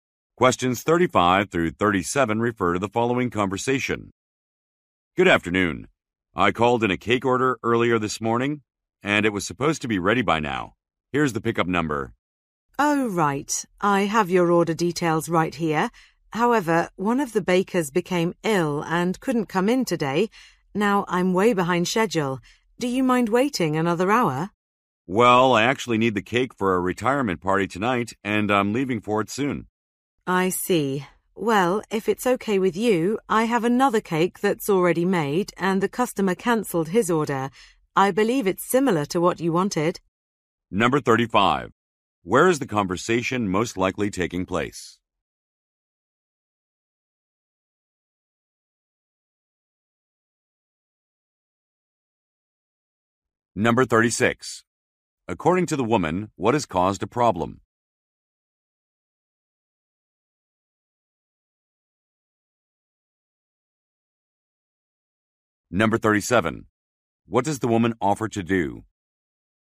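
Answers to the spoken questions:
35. At a bakery
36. A baker became ill and couldn't come in
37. Give him another cake that's already made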